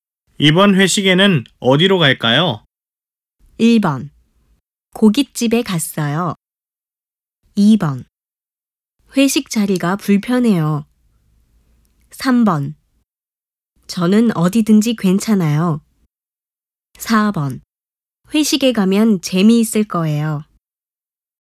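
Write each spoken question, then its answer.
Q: 이번 회식에는 어디로 갈까요?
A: 3: 저는 어디든지 괜찮아요.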